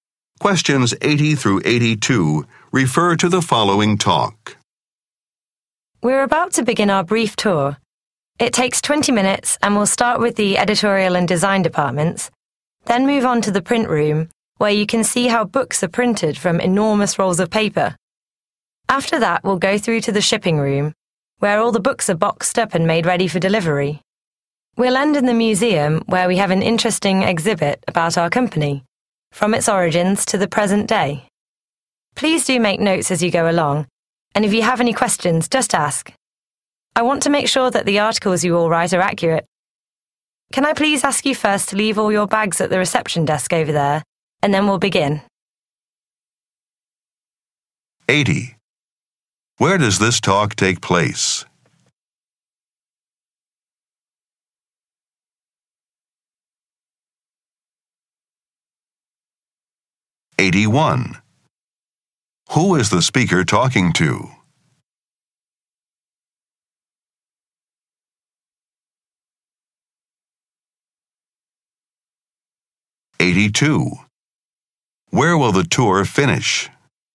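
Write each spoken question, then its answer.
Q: Where does this talk take place?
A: At a book publisher/printer

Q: Who is the speaker talking to?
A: Journalists

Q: Where will the tour finish?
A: In the museum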